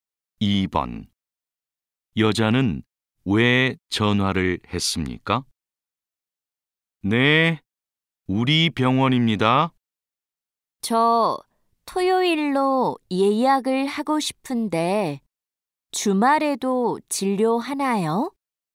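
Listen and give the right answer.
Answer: 토요일로 진료 예약을 하려고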